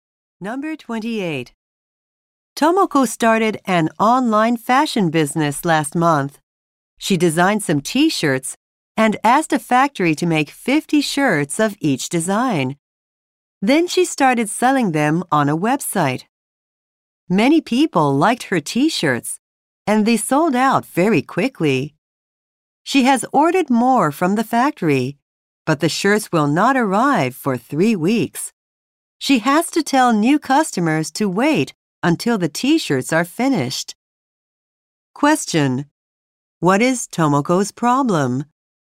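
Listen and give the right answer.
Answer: Her T-shirts sold out and new ones won't arrive for 3 weeks.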